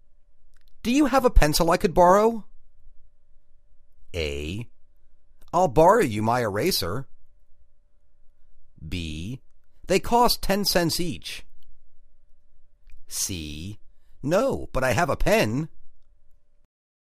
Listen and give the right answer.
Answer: No, but I have a pen.